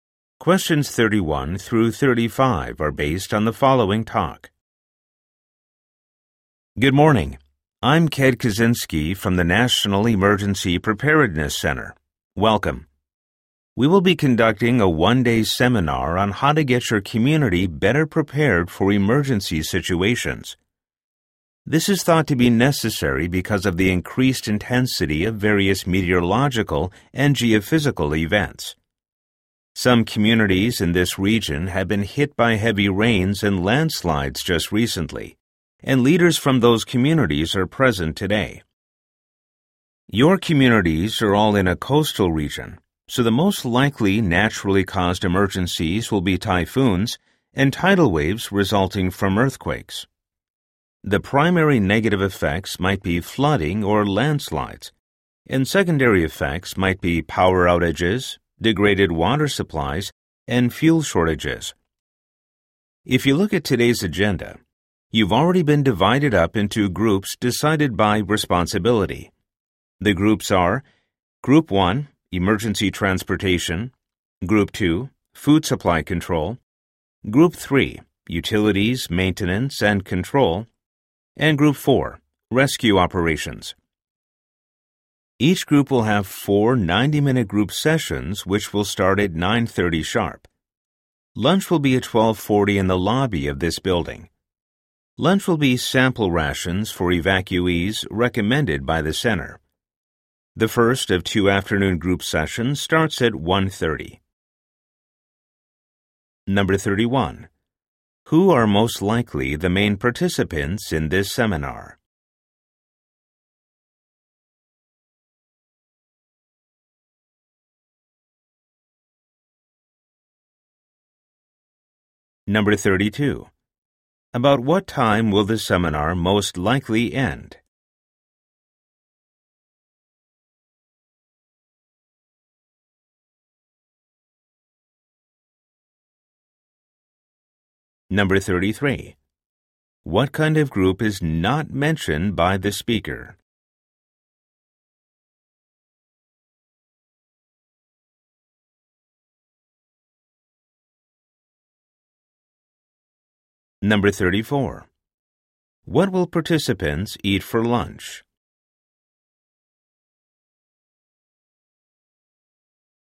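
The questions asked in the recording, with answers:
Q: Who are most likely the main participants in this seminar?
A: Community leaders responsible for emergency preparedness

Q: What will participants eat for lunch?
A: Sample rations for evacuees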